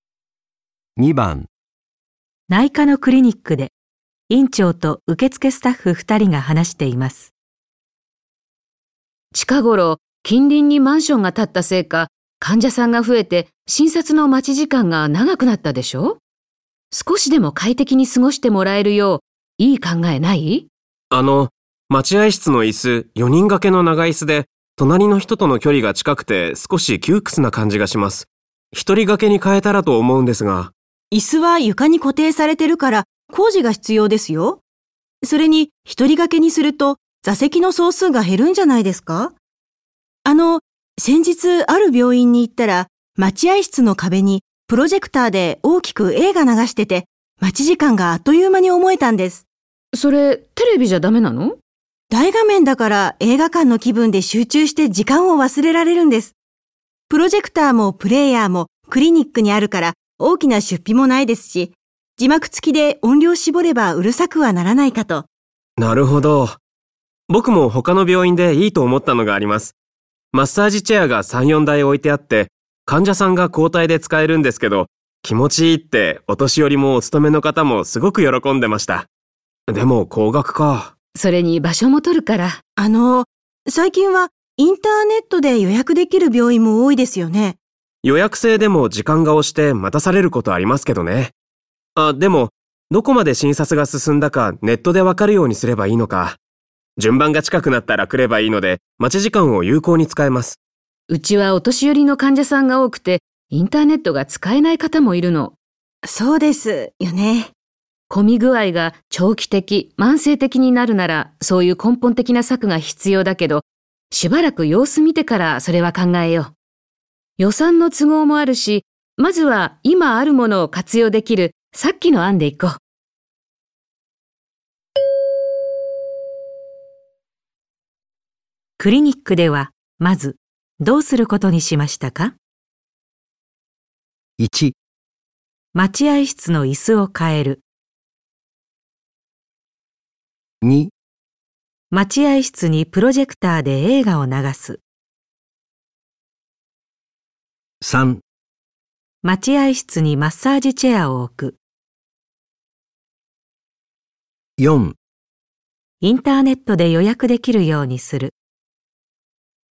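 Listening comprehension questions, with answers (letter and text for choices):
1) クリニックではまずどうすることにしましたか。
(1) 待合室の椅子を変える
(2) 待合室にプロジェクターで映画を流す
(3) 待合室にマッサージチェアを置く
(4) インターネットで予約できるようにする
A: (2) 待合室にプロジェクターで映画を流す

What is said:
女2:椅子は床に固定されてるから工事が必要ですよ。それに一人掛けにすると座席の総数が減るんじゃないですか。あの、先日ある病院に行ったら、待合室の壁にプロジェクターで大きく映画流してて、待ち時間があっという間に思えたんです。
女1:それ、テレビじゃだめなの?
女2:大画面だから映画館の気分で集中して時間を忘れられるんです。プロジェクターもプレーヤーもクリニックにあるから大きな出費もないですし、字幕付きで音量絞れば、うるさくはならないかと???。
男:なるほど。僕も他の病院でいいと思ったのがあります。マッサージチェアが3,4台置いてあって、患者さんが交替で使えるんですけど、気持ちいいってお年寄りもお勤めの方もすごく喜んでました。でも、高額か???。
女1:それに場所も取るから。
女2:あの、最近はインターネットで予約できる病院も多いですよね。
男:予約制でも時間が押して待たされることありますけどね。あ、でも、どこまで診察が進んだかネットでわかるようにすればいいのか。順番が近くなったら来ればいいので、待ち時間を有効に使えます。
女1:うちはお年寄りの患者さんが多くて、インターネットが使えない方もいるの。
女1:混み具合が長期的、慢性的になるなら、そういう根本的な策が必要だけど、しばらくは様子見てからそれは考えよう。予算の都合もあるし、まずは今あるもの活用できるさっきの案でいこう。

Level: N1级别听力题库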